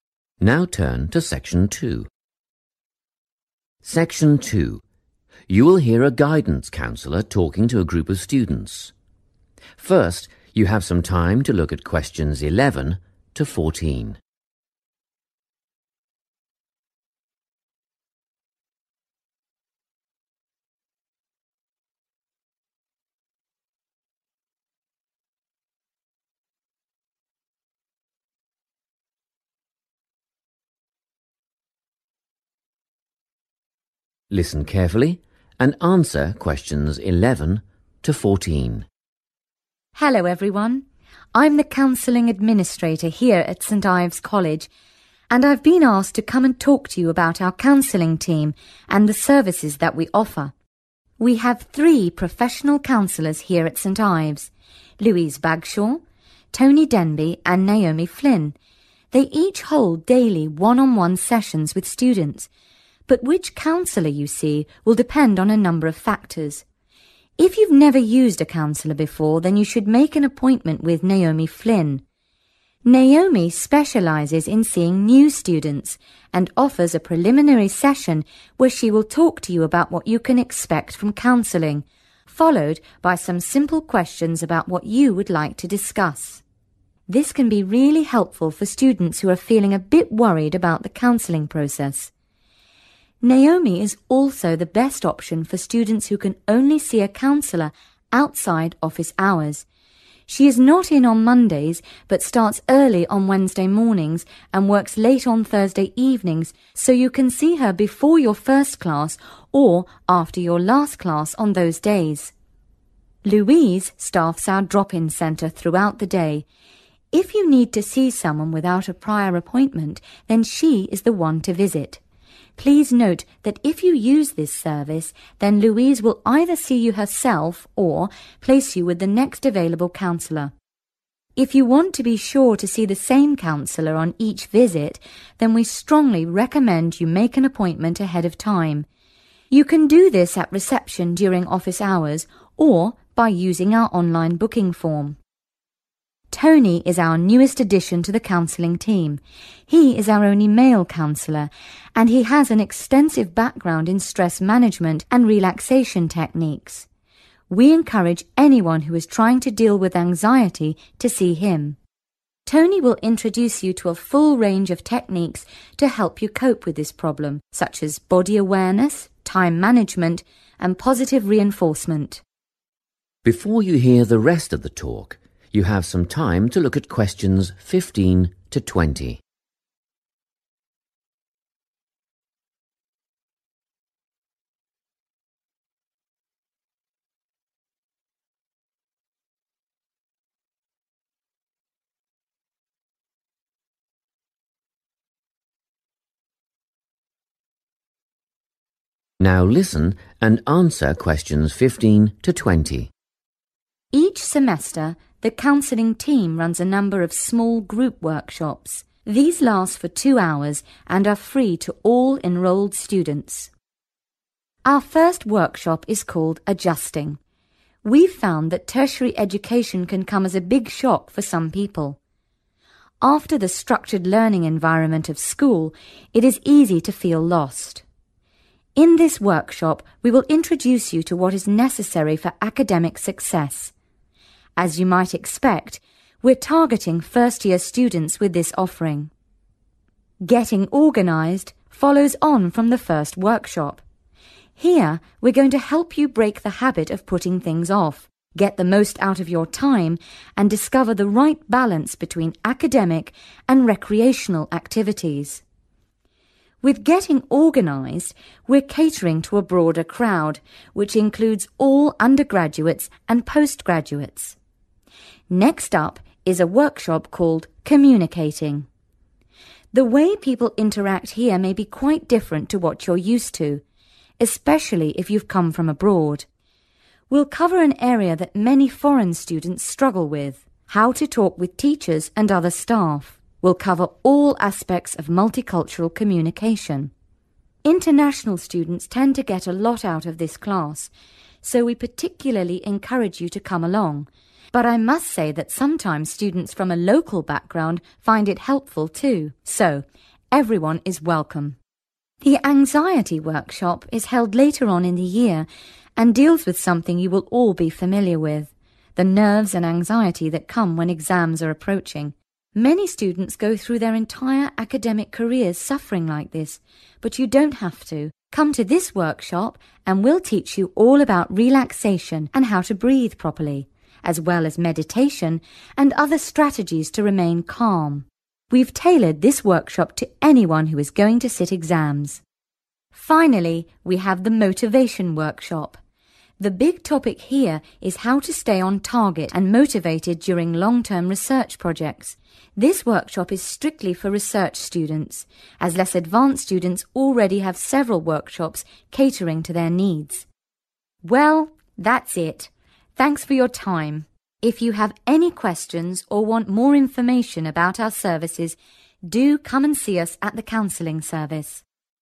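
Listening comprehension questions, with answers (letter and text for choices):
Which counsellor should you see? Write the correct letter, A, B or C, next to questions 11–14.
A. Louise Bagshaw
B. Tony Denby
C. Naomi Flynn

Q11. if it is your first time seeing a counsellor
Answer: C. Naomi Flynn

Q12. if you are unable to see a counsellor during normal office hours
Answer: C. Naomi Flynn

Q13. if you do not have an appointment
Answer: A. Louise Bagshaw

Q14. if your concerns are related to anxiety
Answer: B. Tony Denby

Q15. (15) ..................... students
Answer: first-year

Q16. use time effectively, find (16) ..................... between study and leisure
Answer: right balance

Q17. all students, especially (17) .....................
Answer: international students

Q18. (18) ....................., breathing techniques, meditation, etc.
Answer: relaxation

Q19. (19) .....................staying on track for long periods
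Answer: Motivation

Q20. (20) ..................... students only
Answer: research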